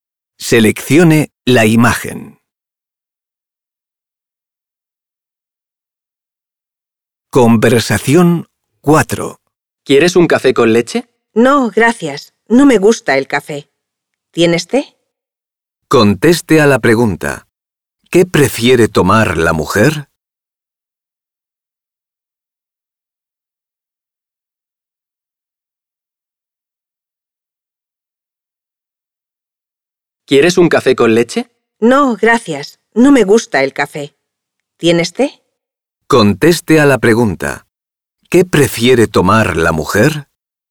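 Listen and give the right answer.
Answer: té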